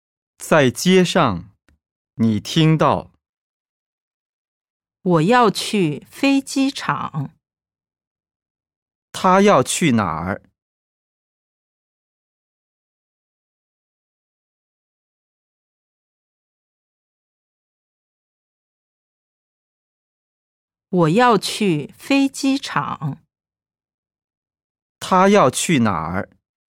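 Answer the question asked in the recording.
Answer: 飞机场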